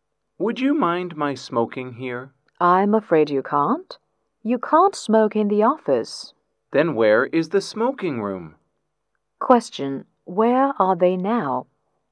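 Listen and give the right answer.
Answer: In the office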